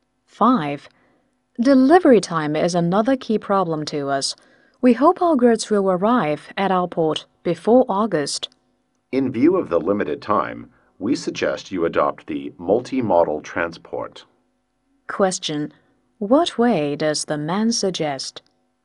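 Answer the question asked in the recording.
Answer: Multi-modal transport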